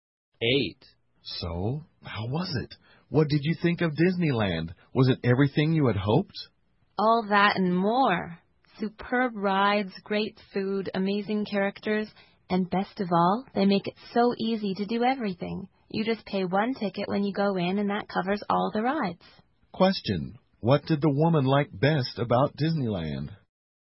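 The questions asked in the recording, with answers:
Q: what did the woman like best about Disneyland?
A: It's easy to do everything: one ticket covers all the rides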